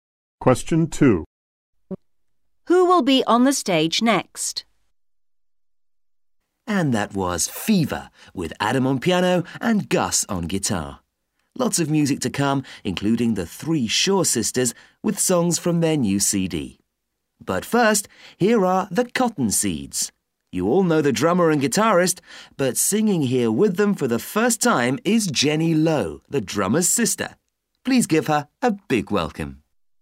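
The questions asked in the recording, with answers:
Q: Who will be on the stage next?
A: The Cottonseeds, with Jenny Lowe singing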